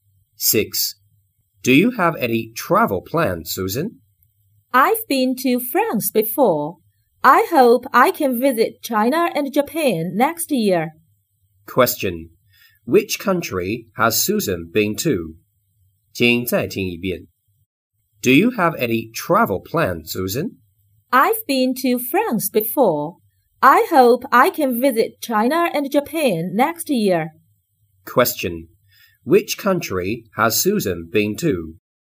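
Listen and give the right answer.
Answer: France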